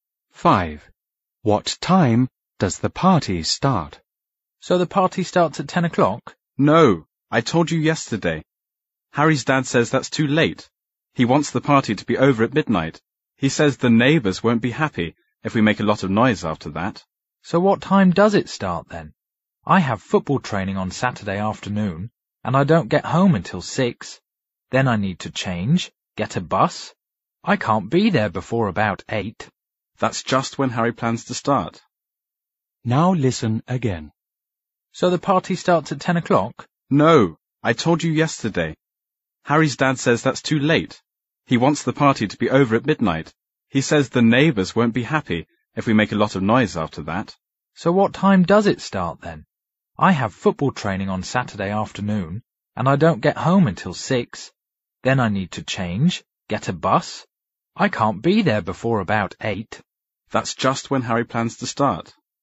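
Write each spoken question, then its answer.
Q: What time does the party start?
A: At 8 o'clock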